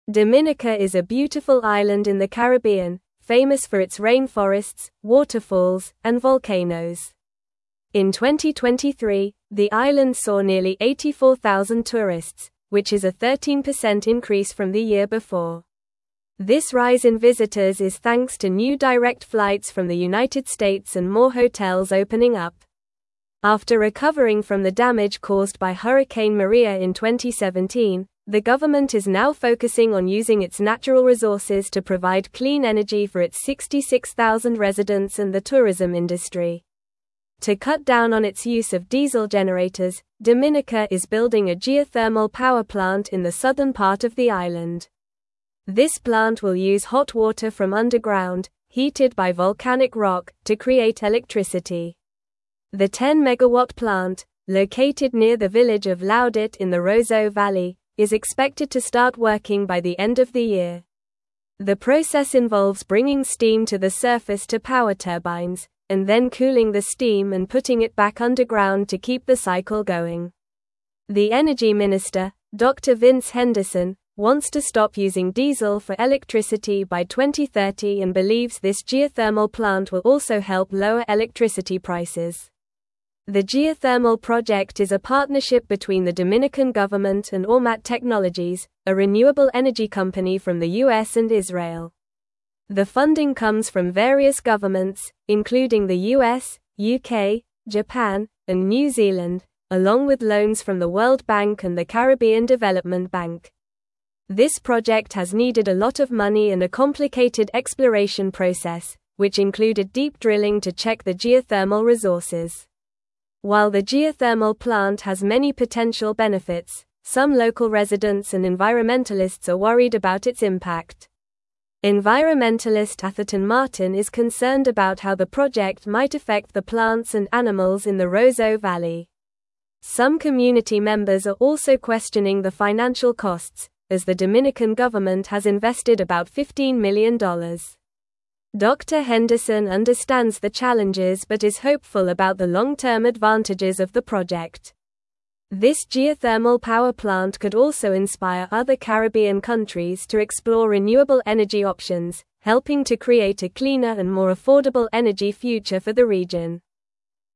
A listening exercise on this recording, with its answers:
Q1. What are some of the natural features that make Dominica a popular tourist destination?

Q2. How did the number of tourists visiting Dominica in 2023 compare to the previous year?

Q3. What is the main reason for the increase in tourists to Dominica?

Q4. What kind of power plant is Dominica building, and what natural resource will it use to generate electricity?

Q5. Who is the energy minister of Dominica, and what goal does he have for electricity generation by 2030?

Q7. Why are some local residents and environmentalists concerned about the geothermal plant?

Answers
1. Dominica is famous for its rainforests, waterfalls, and volcanoes.
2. In 2023, the number of tourists visiting Dominica increased by 13% compared to the previous year.
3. The increase in tourists is mainly due to new direct flights from the United States and more hotels opening up.
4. Dominica is building a geothermal power plant, which will use hot water from underground, heated by volcanic rock, to generate electricity.
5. The energy minister of Dominica is Dr. Vince Henderson, and he aims to stop using diesel for electricity by 2030.
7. Some local residents and environmentalists are worried about the potential impact of the geothermal plant on the plants and animals in the Roseau Valley, as well as the financial costs involved.

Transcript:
Dominica is a beautiful island in the Caribbean, famous for its rainforests, waterfalls, and volcanoes. In 2023, the island saw nearly 84,000 tourists, which is a 13% increase from the year before. This rise in visitors is thanks to new direct flights from the United States and more hotels opening up. After recovering from the damage caused by Hurricane Maria in 2017, the government is now focusing on using its natural resources to provide clean energy for its 66,000 residents and the tourism industry.
To cut down on its use of diesel generators, Dominica is building a geothermal power plant in the southern part of the island. This plant will use hot water from underground, heated by volcanic rock, to create electricity. The 10-megawatt plant, located near the village of Laudat in the Roseau Valley, is expected to start working by the end of the year. The process involves bringing steam to the surface to power turbines, and then cooling the steam and putting it back underground to keep the cycle going. The energy minister, Dr. Vince Henderson, wants to stop using diesel for electricity by 2030 and believes this geothermal plant will also help lower electricity prices.
The geothermal project is a partnership between the Dominican government and Ormat Technologies, a renewable energy company from the US and Israel. The funding comes from various governments, including the US, UK, Japan, and New Zealand, along with loans from the World Bank and the Caribbean Development Bank. This project has needed a lot of money and a complicated exploration process, which included deep drilling to check the geothermal resources.
While the geothermal plant has many potential benefits, some local residents and environmentalists are worried about its impact. Environmentalist Atherton Martin is concerned about how the project might affect the plants and animals in the Roseau Valley. Some community members are also questioning the financial costs, as the Dominican government has invested about $15 million. Dr. Henderson understands the challenges but is hopeful about the long-term advantages of the project. This geothermal power plant could also inspire other Caribbean countries to explore renewable energy options, helping to create a cleaner and more affordable energy future for the region.
Show model answerThe geothermal power plant could inspire other Caribbean countries to explore renewable energy options, helping to create a cleaner and more affordable energy future for the region.
a cleaner and more affordable energy future for the region.

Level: Level 3